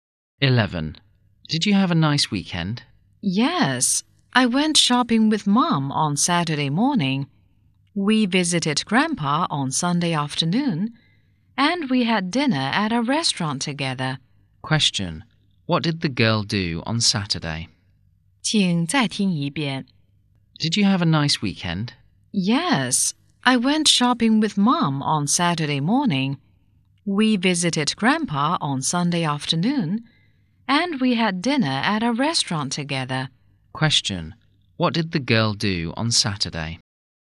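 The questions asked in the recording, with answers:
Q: What did the girl do on Saturday?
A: She went shopping with her mom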